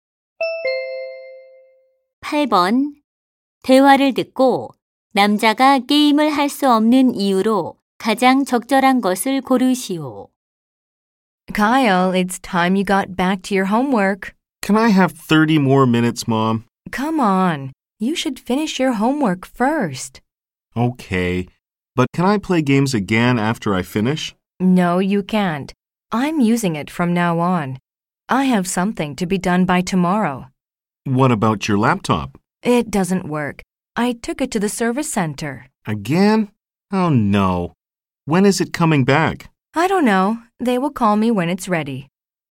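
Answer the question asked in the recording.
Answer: 엄마가 컴퓨터를 써야 하고 노트북은 수리 중이라서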